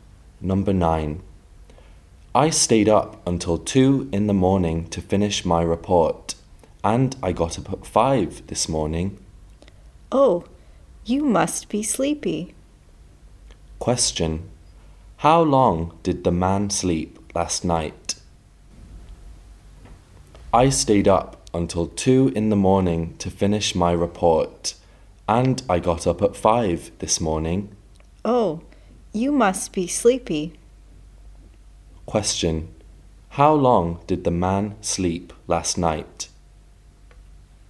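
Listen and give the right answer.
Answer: Three hours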